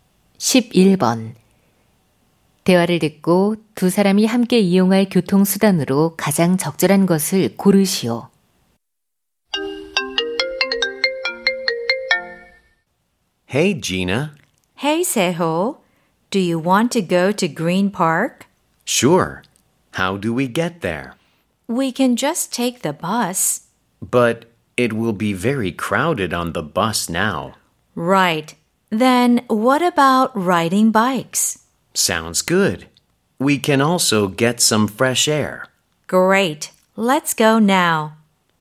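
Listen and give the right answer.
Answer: 자전거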